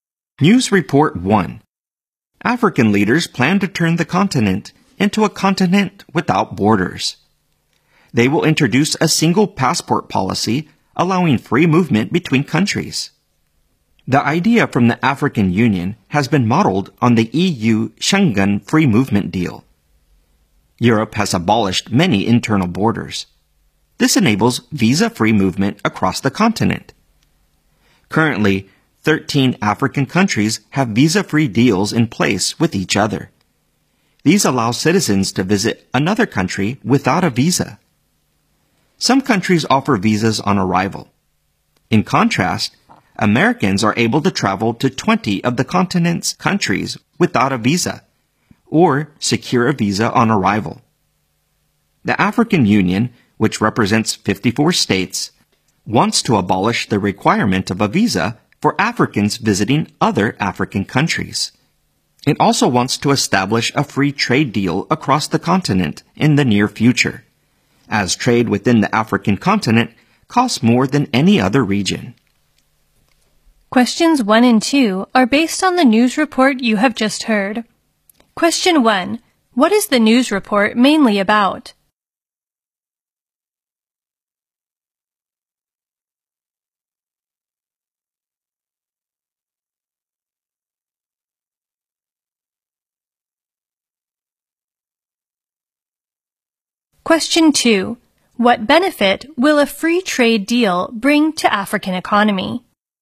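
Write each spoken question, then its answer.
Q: What is the news report mainly about?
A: African leaders' plan for a continent without borders, with a single passport allowing free movement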